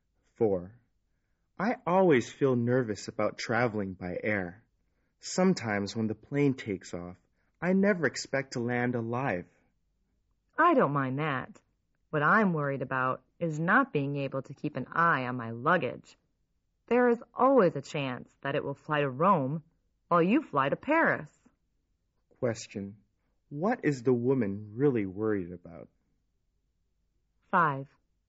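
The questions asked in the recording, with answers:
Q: What is the woman really worried about?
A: That her luggage will get lost or go to the wrong place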